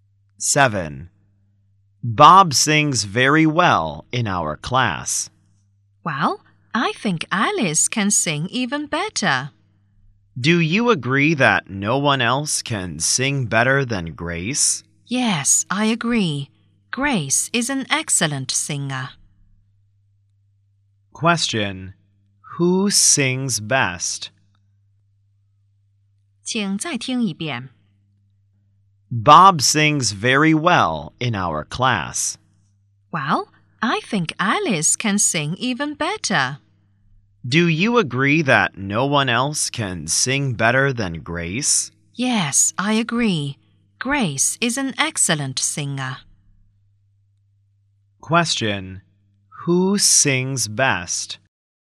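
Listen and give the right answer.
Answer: Grace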